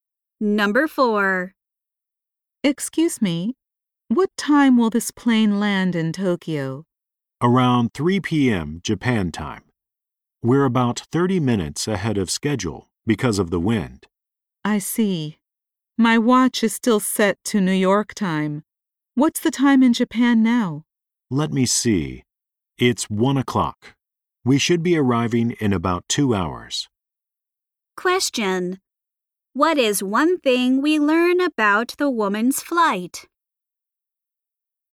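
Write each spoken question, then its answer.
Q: What is one thing we learn about the woman's flight?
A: It will arrive about 30 minutes early.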